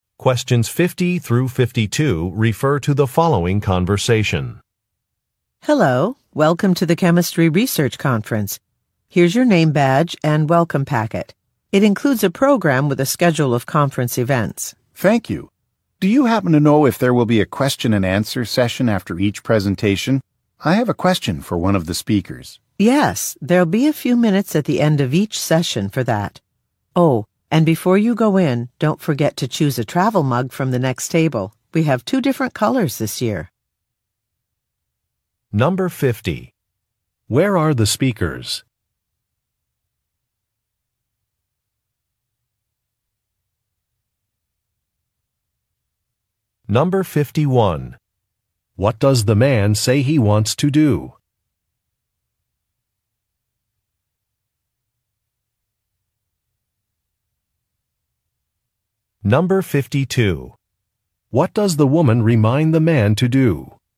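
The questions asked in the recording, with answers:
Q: Where are the speakers?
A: At a chemistry research conference

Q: What does the man say he wants to do?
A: Ask one of the speakers a question

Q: What does the woman remind the man to do?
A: Choose a travel mug from the next table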